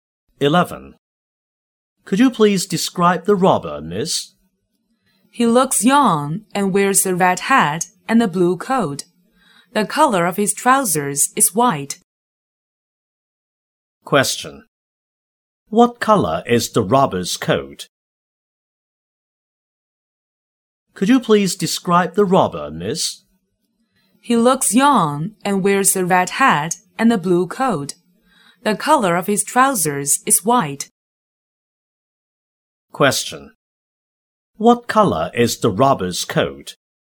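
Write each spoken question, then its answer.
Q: What color is the robber's coat?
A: Blue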